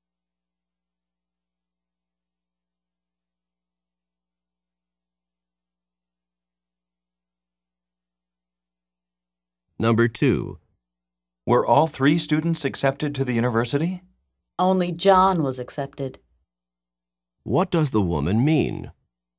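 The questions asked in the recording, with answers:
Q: What does the woman mean?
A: Only John was accepted; the other two were not.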